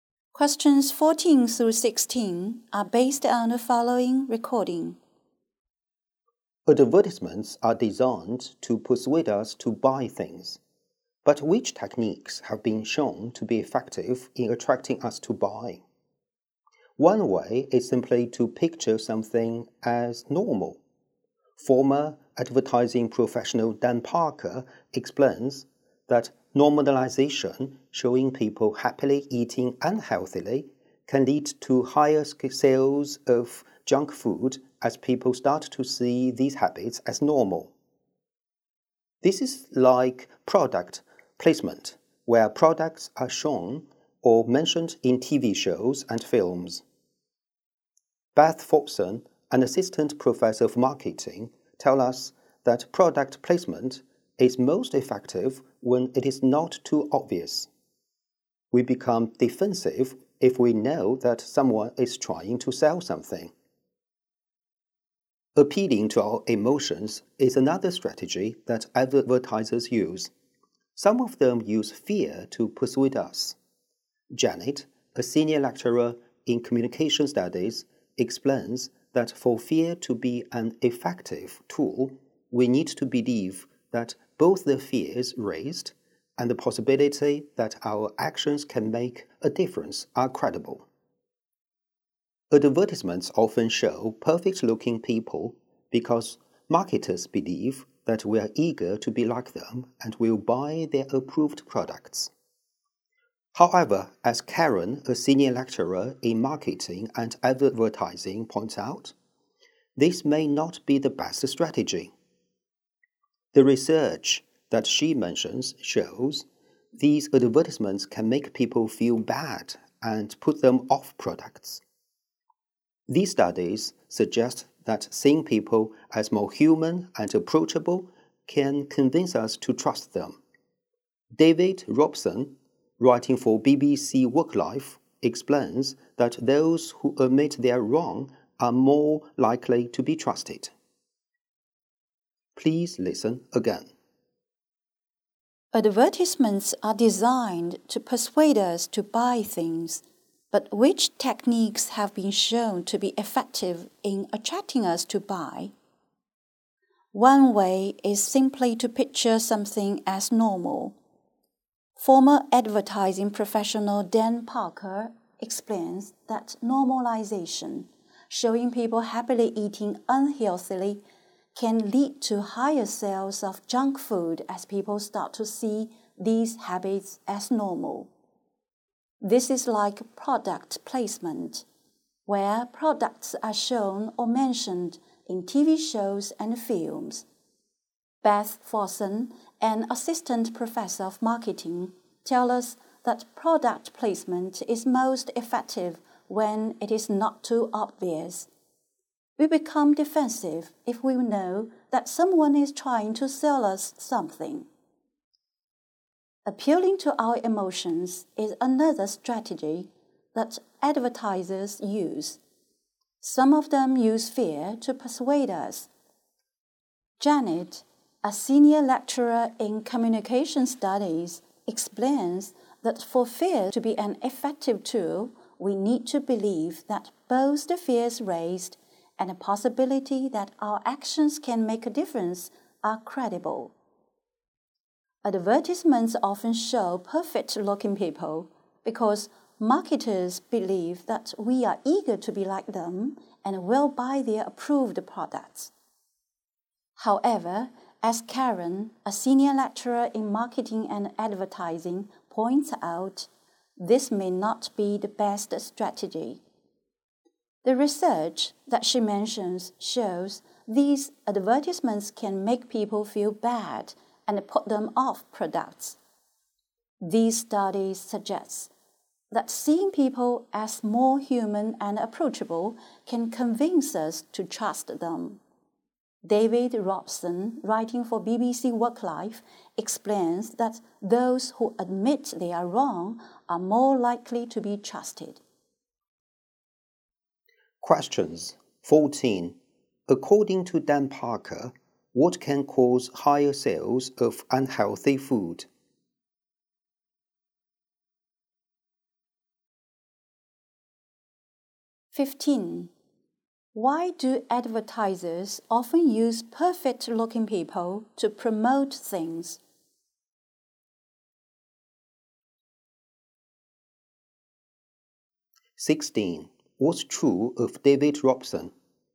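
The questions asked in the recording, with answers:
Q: According to Dan Parker, what can cause higher sales of unhealthy food?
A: Normalization: showing people happily eating unhealthy food

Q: Why do advertisers often use perfect-looking people to promote things?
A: They believe people are eager to be like them and will buy their approved products

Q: What's true of David Robson?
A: He explains that people who admit they are wrong are more likely to be trusted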